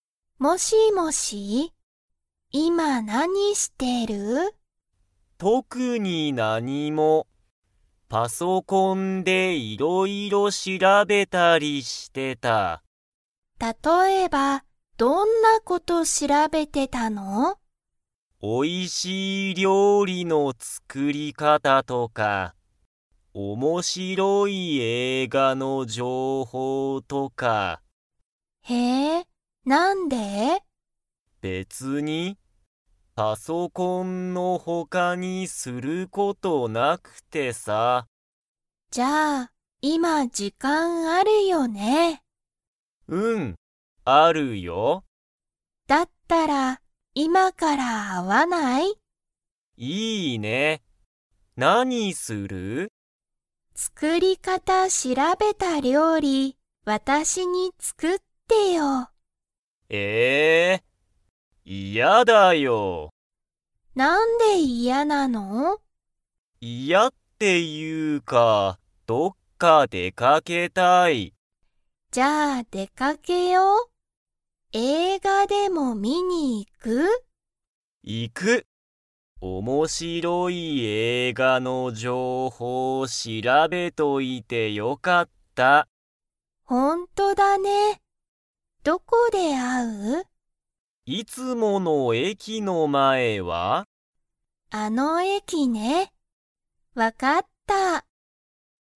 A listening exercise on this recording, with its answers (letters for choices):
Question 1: さとしは今いま、時間じかんが 。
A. ある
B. ない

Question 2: 二人ふたりは、どこで会あいますか?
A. 駅えき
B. 学校がっこう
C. ゆかりの家いえ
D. さとしの家いえ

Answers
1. A
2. A

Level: Level 3